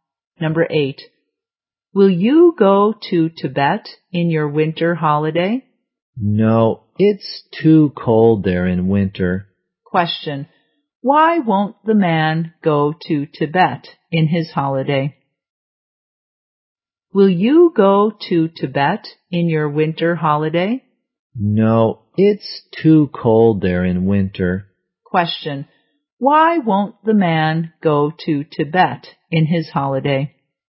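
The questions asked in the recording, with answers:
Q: Question, why won't the man go to Tibet in his holiday?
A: It's too cold there in winter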